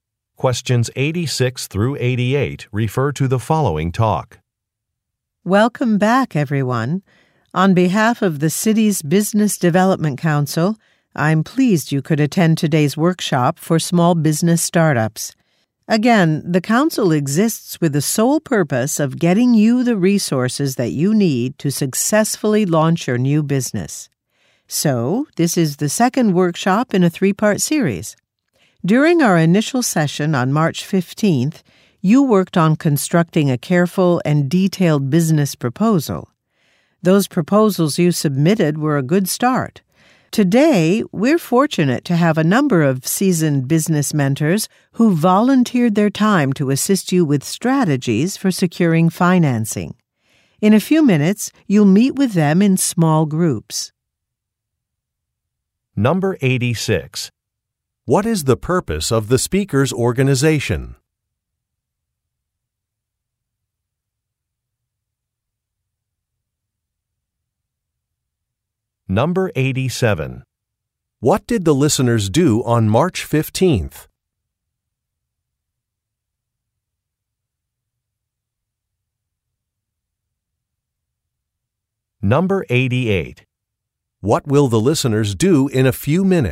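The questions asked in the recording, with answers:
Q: What is the purpose of the speaker's organization?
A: To help new businesses get the resources they need to launch

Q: What did the listeners do on March 15th?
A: They worked on writing detailed business proposals

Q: What will the listeners do in a few minutes?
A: Meet with business mentors in small groups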